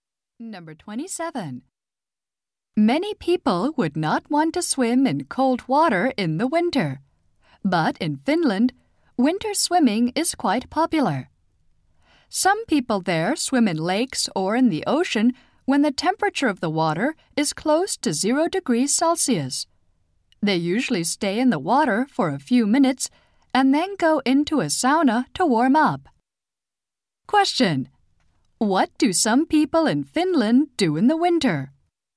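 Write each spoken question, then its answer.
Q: Question: What do some people in Finland do in the winter?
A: Swim in very cold water.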